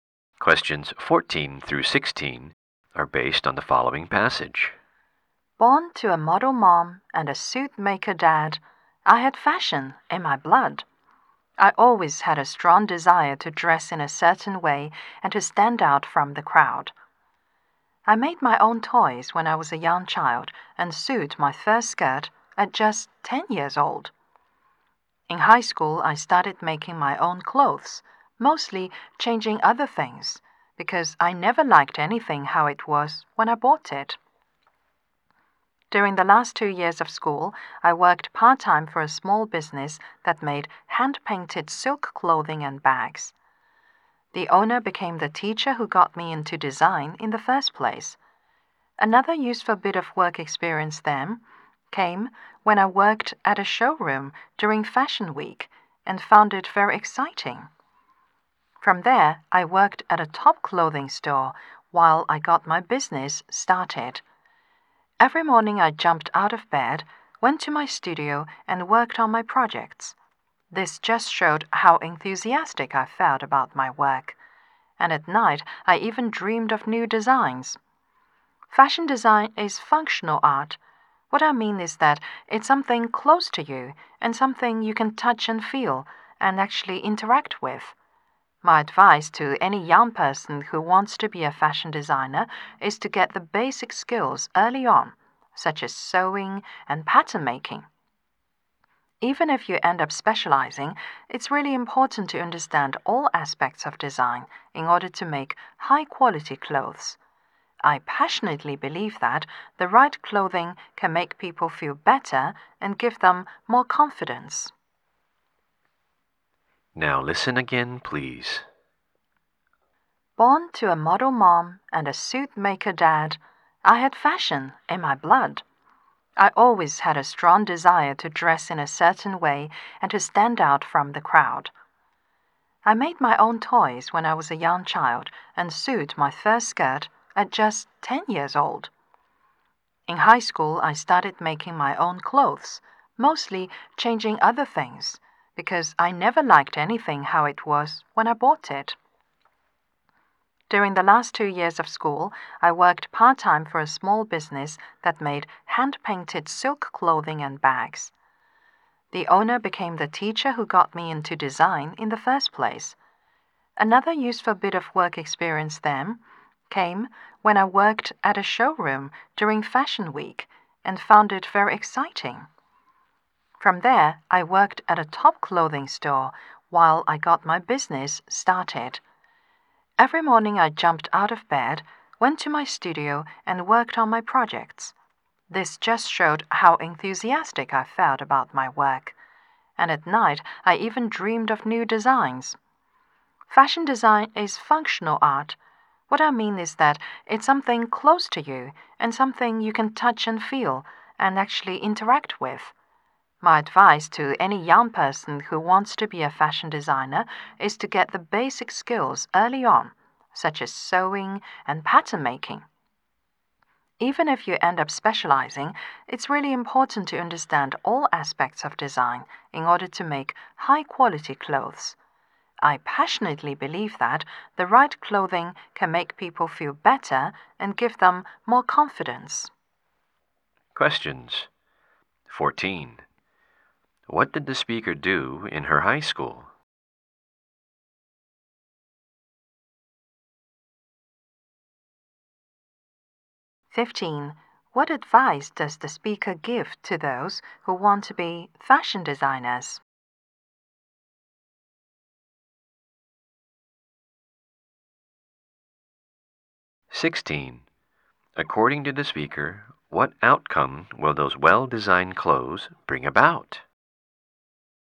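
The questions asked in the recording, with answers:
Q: What did the speaker do in her high school?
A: She made her own clothes

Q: What advice does the speaker give to those who want to be fashion designers?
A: Get basic skills like sewing and pattern making early

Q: According to the speaker, what outcome will those well-designed clothes bring about?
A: People feel better and more confident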